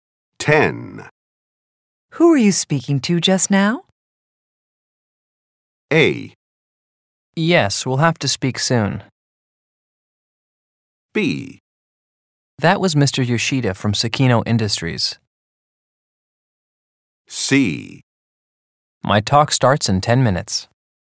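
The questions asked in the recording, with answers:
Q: Who are you speaking to just now?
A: B: That was Mr. Yoshida from Sakino Industries.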